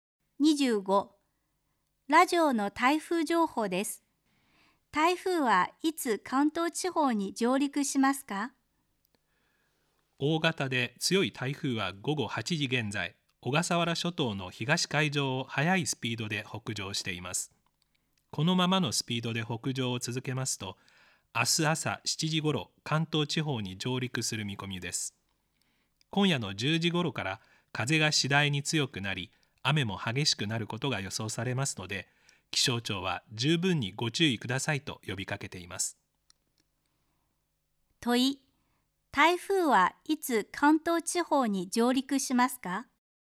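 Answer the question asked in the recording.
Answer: 明日の朝7時ごろ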